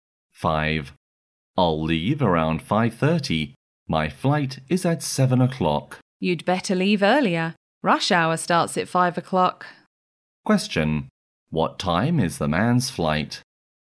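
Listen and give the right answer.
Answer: 7 o'clock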